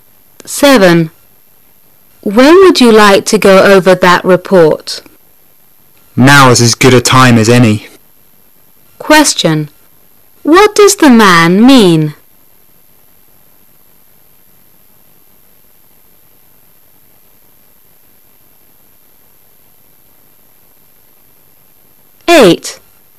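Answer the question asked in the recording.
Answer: He wants to go over the report right now.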